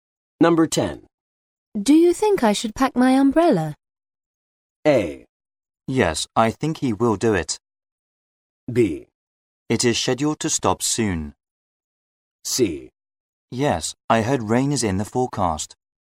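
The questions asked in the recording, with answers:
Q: Do you think I should pack my umbrella?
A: C: Yes, I heard rain is in the forecast.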